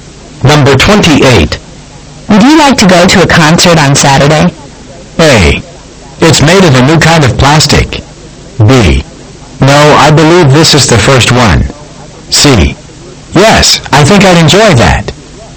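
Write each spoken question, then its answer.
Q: Would you like to go to a concert on Saturday?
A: C: Yes, I think I'd enjoy that.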